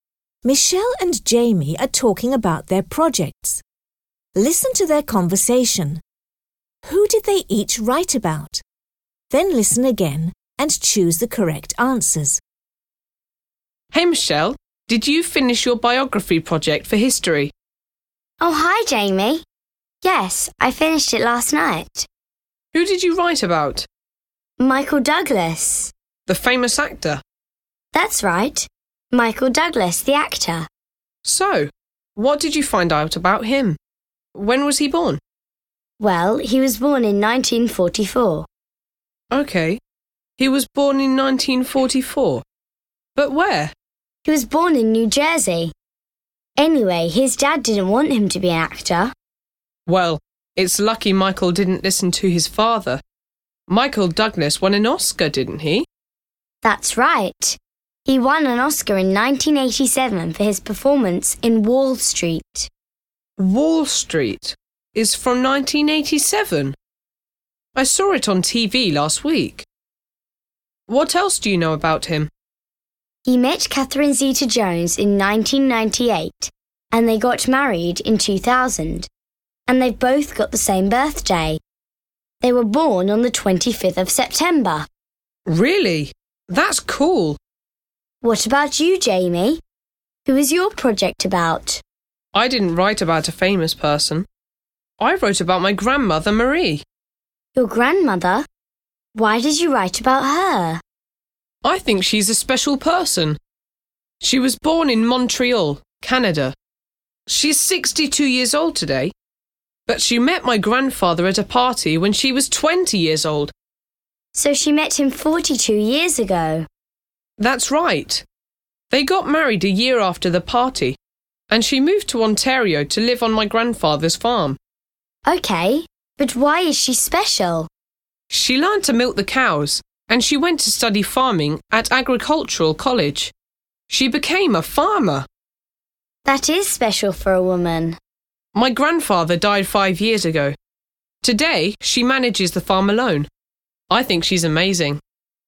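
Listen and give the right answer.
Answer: Michelle wrote about Michael Douglas, the actor; Jamie wrote about his grandmother, Marie.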